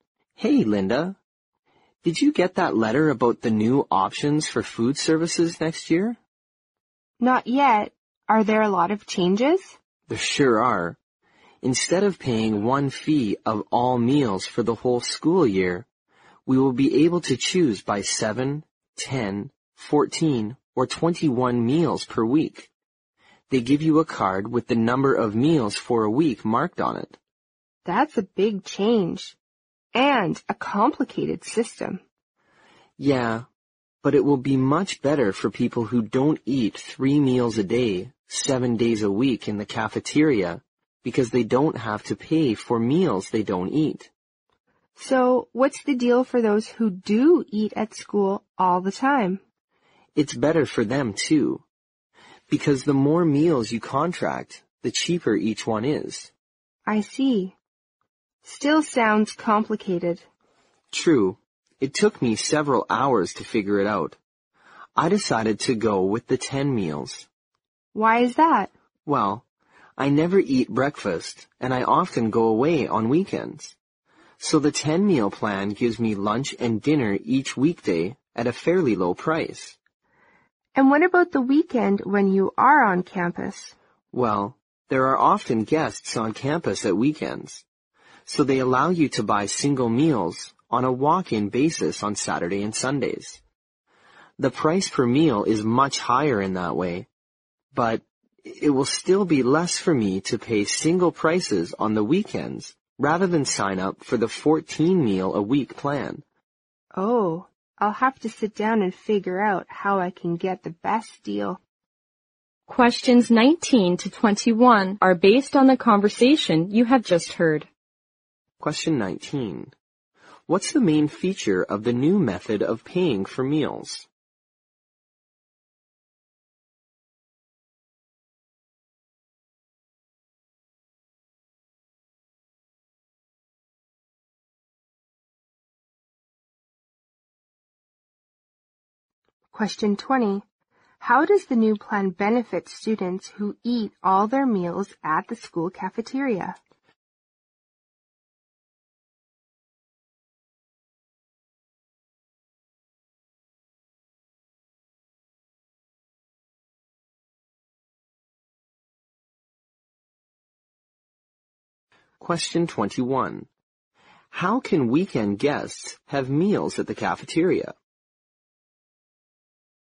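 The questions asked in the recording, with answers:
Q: What's the main feature of the new method of paying for meals?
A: Students can choose how many meals a week to pay for.

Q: How does the new plan benefit students who eat all their meals at the school cafeteria?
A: The more meals they contract, the cheaper each meal is.

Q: How can weekend guests have meals at the cafeteria?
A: They can buy single meals on a walk-in basis.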